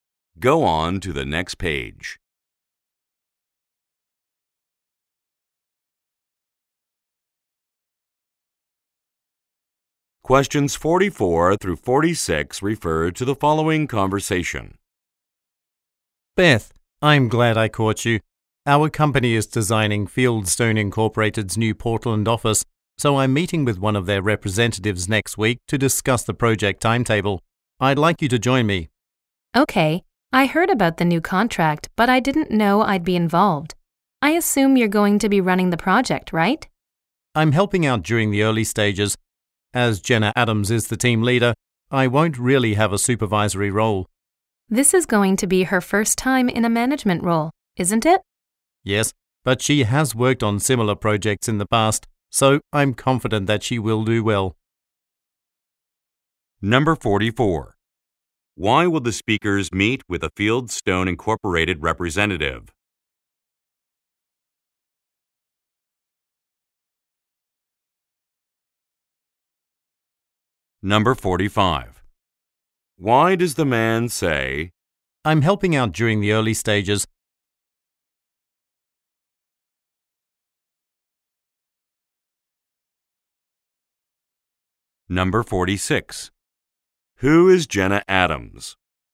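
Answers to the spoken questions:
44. To discuss the project timetable
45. He will not be running the project
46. The project team leader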